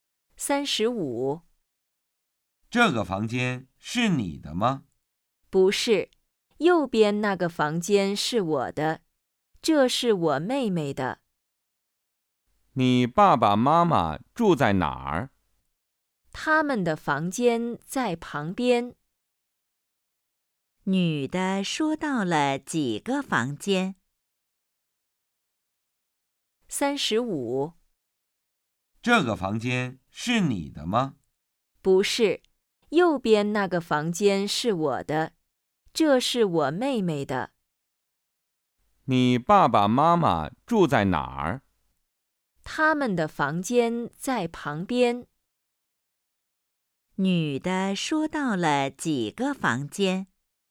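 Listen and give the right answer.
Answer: 三个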